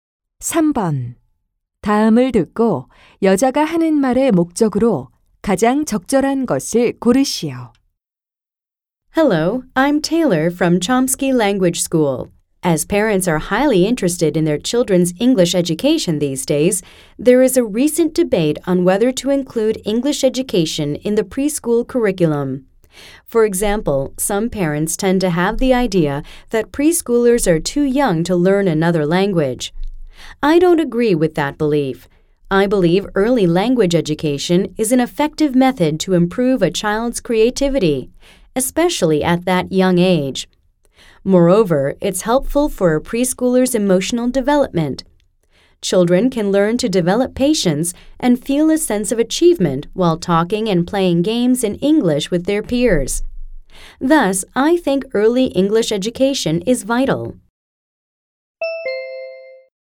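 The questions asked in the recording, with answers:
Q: 다음을 듣고 여자가 하는 말의 목적으로 가장 적절한 것을 고르시오.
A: To argue that early (preschool) English education is vital and should be included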